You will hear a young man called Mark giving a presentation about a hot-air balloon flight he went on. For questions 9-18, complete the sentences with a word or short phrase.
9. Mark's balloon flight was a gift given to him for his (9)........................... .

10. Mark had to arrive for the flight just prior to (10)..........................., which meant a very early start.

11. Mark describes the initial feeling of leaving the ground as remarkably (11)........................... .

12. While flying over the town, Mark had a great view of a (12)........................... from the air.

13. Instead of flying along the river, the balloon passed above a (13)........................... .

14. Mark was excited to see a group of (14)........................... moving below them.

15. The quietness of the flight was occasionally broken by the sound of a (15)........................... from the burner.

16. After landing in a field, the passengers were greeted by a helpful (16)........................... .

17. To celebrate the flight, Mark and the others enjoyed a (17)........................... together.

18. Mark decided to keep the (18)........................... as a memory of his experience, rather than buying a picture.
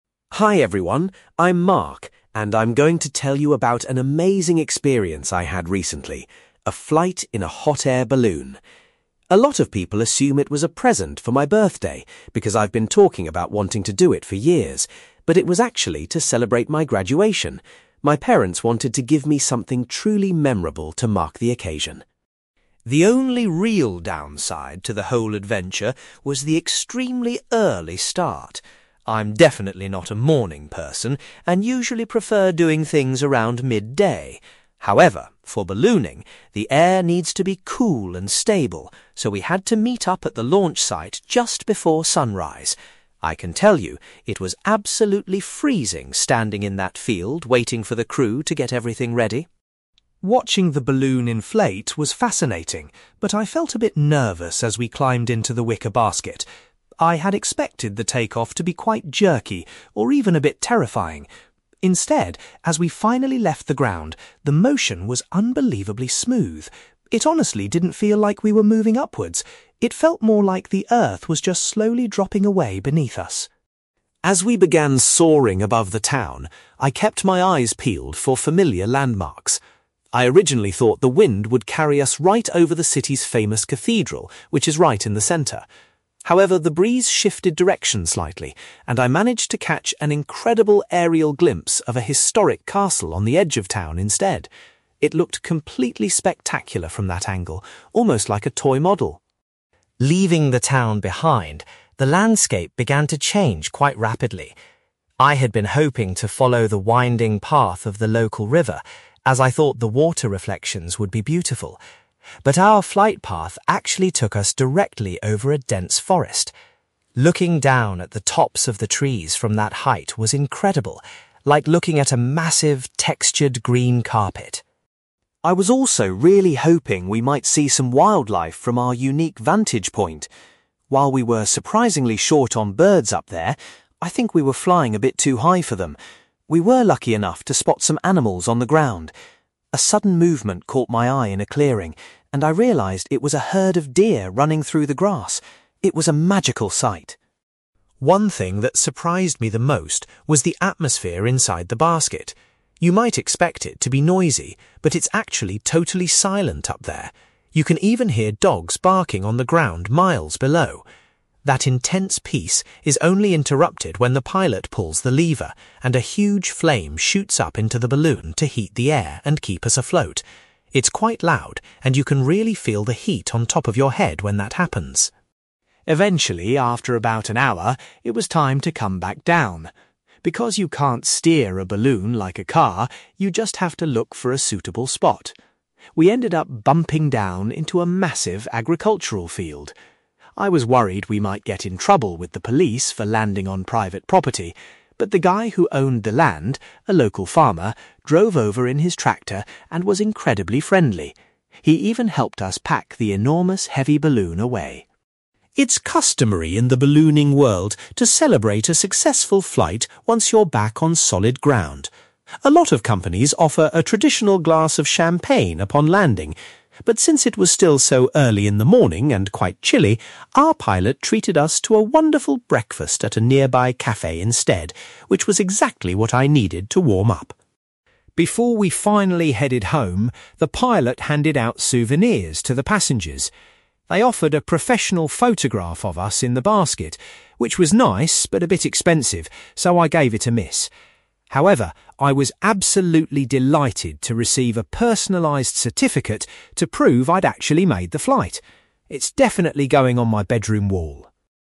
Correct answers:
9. graduation
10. sunrise
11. smooth
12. (historic) castle
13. (dense) forest
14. deer
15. (huge) flame
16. (local) farmer
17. breakfast
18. certificate

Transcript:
Mark: Hi everyone. I'm Mark, and I'm going to tell you about an amazing experience I had recently: a flight in a hot-air balloon. A lot of people assume it was a present for my birthday, because I've been talking about wanting to do it for years. But it was actually to celebrate my graduation. My parents wanted to give me something truly memorable to mark the occasion.
The only real downside to the whole adventure was the extremely early start. I'm definitely not a morning person and usually prefer doing things around midday. However, for ballooning, the air needs to be cool and stable, so we had to meet up at the launch site just before sunrise. I can tell you, it was absolutely freezing standing in that field waiting for the crew to get everything ready!
Watching the balloon inflate was fascinating, but I felt a bit nervous as we climbed into the wicker basket. I had expected the take-off to be quite jerky, or even a bit terrifying. Instead, as we finally left the ground, the motion was unbelievably smooth. It honestly didn't feel like we were moving upwards; it felt more like the earth was just slowly dropping away beneath us.
As we began soaring above the town, I kept my eyes peeled for familiar landmarks. I originally thought the wind would carry us right over the city's famous cathedral, which is right in the centre. However, the breeze shifted direction slightly, and I managed to catch an incredible aerial glimpse of a historic castle on the edge of town instead. It looked completely spectacular from that angle, almost like a toy model.
Leaving the town behind, the landscape began to change quite rapidly. I had been hoping to follow the winding path of the local river, as I thought the water reflections would be beautiful. But our flight path actually took us directly over a dense forest. Looking down at the tops of the trees from that height was incredible, like looking at a massive, textured green carpet.
I was also really hoping we might see some wildlife from our unique vantage point. While we were surprisingly short on birds up there—I think we were flying a bit too high for them—we were lucky enough to spot some animals on the ground. A sudden movement caught my eye in a clearing, and I realised it was a herd of deer running through the grass. It was a magical sight.
One thing that surprised me the most was the atmosphere inside the basket. You might expect it to be noisy, but it's actually totally silent up there. You can even hear dogs barking on the ground miles below. That intense peace is only interrupted when the pilot pulls the lever, and a huge flame shoots up into the balloon to heat the air and keep us afloat. It's quite loud and you can really feel the heat on top of your head when that happens!
Eventually, after about an hour, it was time to come back down. Because you can't steer a balloon like a car, you just have to look for a suitable spot. We ended up bumping down into a massive agricultural field. I was worried we might get in trouble with the police for landing on private property, but the guy who owned the land, a local farmer, drove over in his tractor and was incredibly friendly. He even helped us pack the enormous heavy balloon away.
It's customary in the ballooning world to celebrate a successful flight once you're back on solid ground. A lot of companies offer a traditional glass of champagne upon landing. But since it was still so early in the morning and quite chilly, our pilot treated us to a wonderful breakfast at a nearby café instead, which was exactly what I needed to warm up.
Before we finally headed home, the pilot handed out souvenirs to the passengers. They offered a professional photograph of us in the basket, which was nice but a bit expensive, so I gave it a miss. However, I was absolutely delighted to receive a personalized certificate to prove I'd actually made the flight. It's definitely going on my bedroom wall!

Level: B2